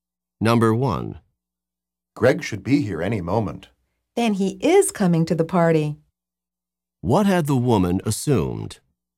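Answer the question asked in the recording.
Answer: Greg was not coming to the party.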